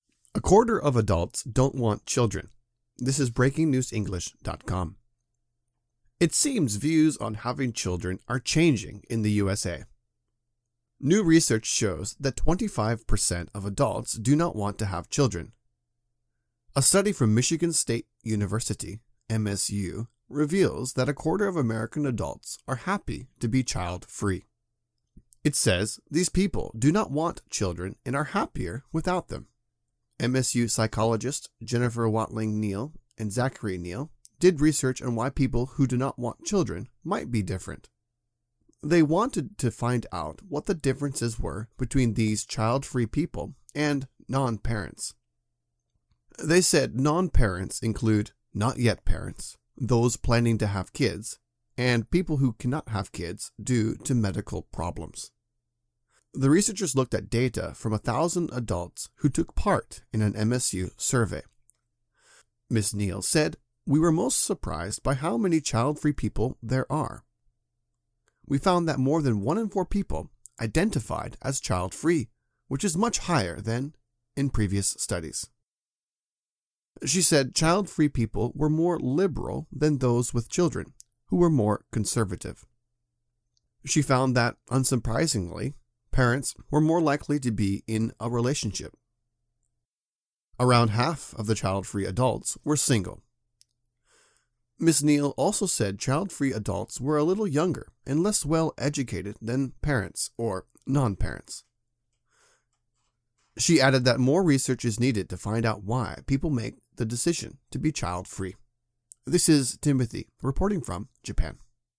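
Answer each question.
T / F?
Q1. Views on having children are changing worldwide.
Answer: F

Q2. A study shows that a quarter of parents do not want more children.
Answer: F

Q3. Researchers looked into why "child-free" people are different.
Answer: T

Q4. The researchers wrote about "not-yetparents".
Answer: T

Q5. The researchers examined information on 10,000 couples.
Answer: F

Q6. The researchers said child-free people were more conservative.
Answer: F

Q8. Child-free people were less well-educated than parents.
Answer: T

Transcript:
A quarter of adults don't want children
It seems views on having children are changing in the USA. New research shows that 25 per cent of adults do not want to have children. A study from Michigan State University (MSU) reveals that a quarter of American adults are happy to be "child-free". It says these people do not want children and are happier without them. 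MSU psychologists Jennifer Watling Neal and Zachary Neal did research on why people who do not want children might be different. They wanted to find out what the differences were between these child-free people and "non-parents". They said non-parents include "not-yet-parents" (those planning to have kids) and people who cannot have kids due to medical problems.
The researchers looked at data from 1,000 adults who took part in an MSU survey. Ms Neal said: "We were most surprised by how many child-free people there are. We found that more than one in four people...identified as child-free, which is much higher than...in previous studies." She said child-free people were more liberal than those with children, who were more conservative. She found that unsurprisingly, parents were more likely to be in a relationship. Around half of the child-free adults were single. Ms Neal also said child-free adults were a little younger and less well-educated than parents or non-parents. 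She added that more research is needed to find out why people make the decision to be child-free.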